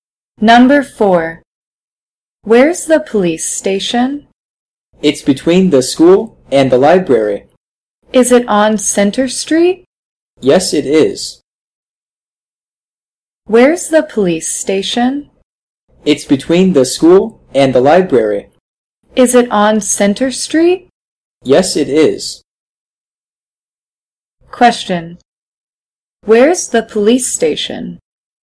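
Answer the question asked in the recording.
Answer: On Center Street, between the school and the library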